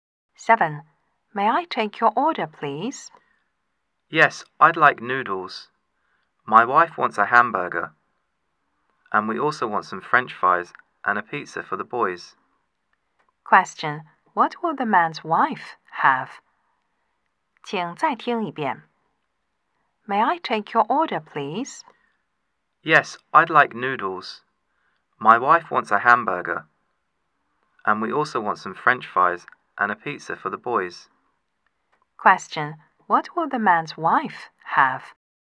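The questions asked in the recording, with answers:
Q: What will the man's wife have?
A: A hamburger.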